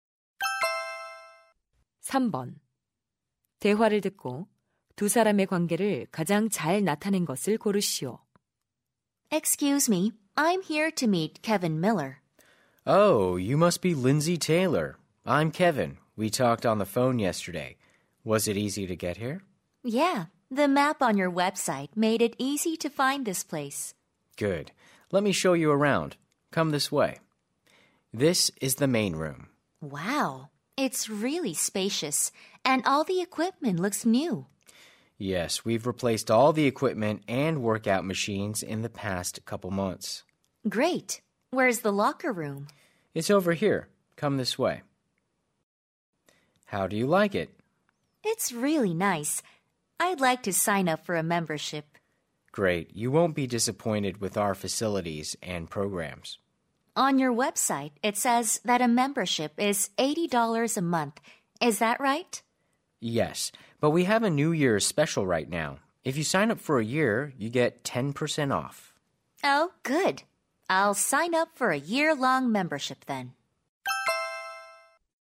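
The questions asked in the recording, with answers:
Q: 대화를 듣고 두 사람의 관계를 가장 잘 나타낸 것을 고르시오.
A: 헬스장 직원 - 회원 가입 희망자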